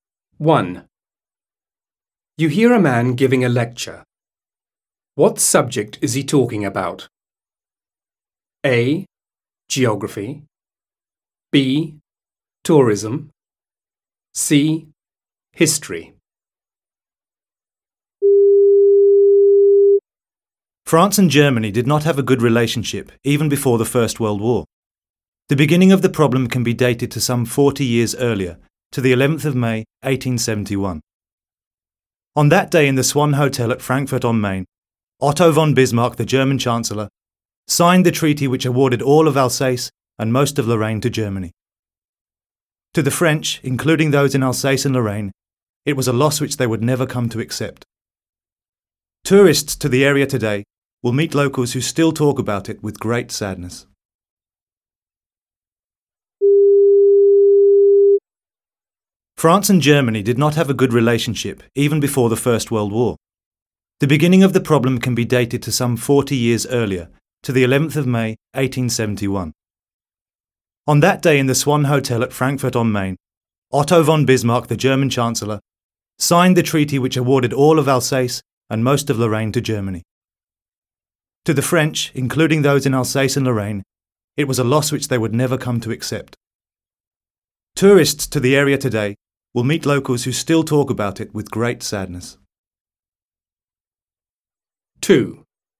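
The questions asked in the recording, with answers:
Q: What subject is he talking about?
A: C: history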